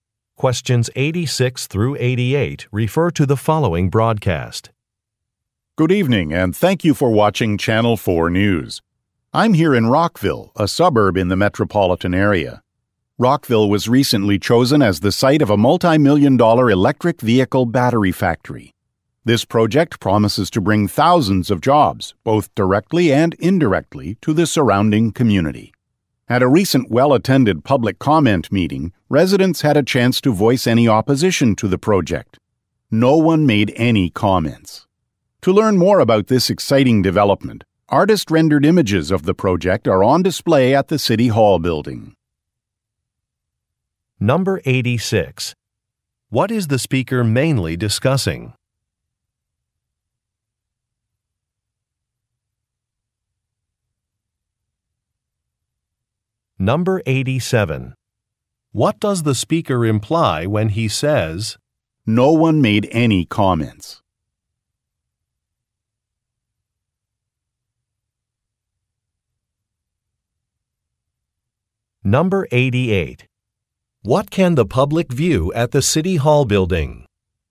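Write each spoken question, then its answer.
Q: What is the speaker mainly discussing?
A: A new electric vehicle battery factory

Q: What does the speaker imply when he says,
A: Residents support the project

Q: What can the public view at the City Hall building?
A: Artist-rendered images of the project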